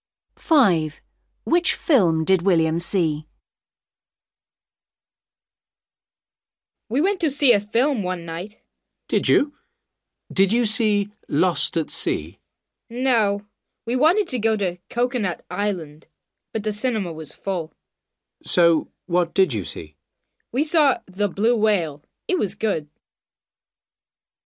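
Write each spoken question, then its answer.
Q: Which film did William see?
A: The Blue Whale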